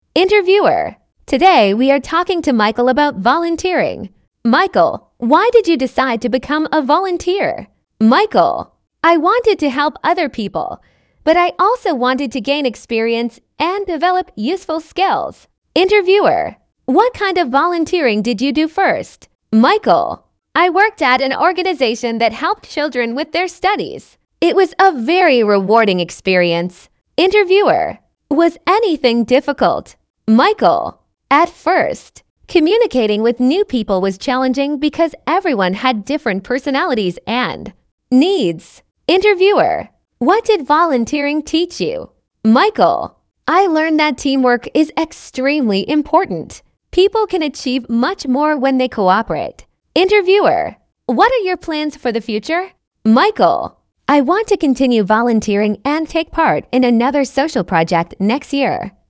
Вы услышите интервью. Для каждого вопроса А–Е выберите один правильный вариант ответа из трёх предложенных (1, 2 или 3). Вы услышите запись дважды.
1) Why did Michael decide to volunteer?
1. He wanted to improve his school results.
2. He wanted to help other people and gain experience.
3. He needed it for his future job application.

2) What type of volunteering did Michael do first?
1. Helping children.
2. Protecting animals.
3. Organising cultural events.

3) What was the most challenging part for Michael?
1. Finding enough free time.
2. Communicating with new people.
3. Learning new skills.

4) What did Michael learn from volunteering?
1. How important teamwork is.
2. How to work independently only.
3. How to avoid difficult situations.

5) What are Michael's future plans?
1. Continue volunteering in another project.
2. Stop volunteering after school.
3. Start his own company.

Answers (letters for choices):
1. 2
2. 1
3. 2
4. 1
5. 1

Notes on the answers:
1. Michael хотел помогать людям и получать опыт.
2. Сначала он помогал детям.
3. Ему было сложно общаться с новыми людьми.
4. Он понял важность командной работы.
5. Он планирует продолжить волонтёрство.

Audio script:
Interviewer: Today we are talking to Michael about volunteering. Michael, why did you decide to become a volunteer?
Michael: I wanted to help other people, but I also wanted to gain experience and develop useful skills.
Interviewer: What kind of volunteering did you do first?
Michael: I worked at an organisation that helped children with their studies. It was a very rewarding experience.
Interviewer: Was anything difficult?
Michael: At first, communicating with new people was challenging because everyone had different personalities and needs.
Interviewer: What did volunteering teach you?
Michael: I learned that teamwork is extremely important. People can achieve much more when they cooperate.
Interviewer: What are your plans for the future?
Michael: I want to continue volunteering and take part in another social project next year.